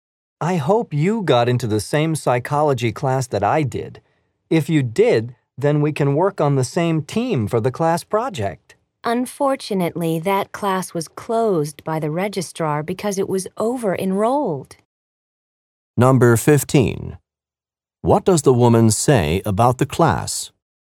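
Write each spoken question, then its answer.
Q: What does the woman say about the class?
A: The registrar closed it because it was over-enrolled.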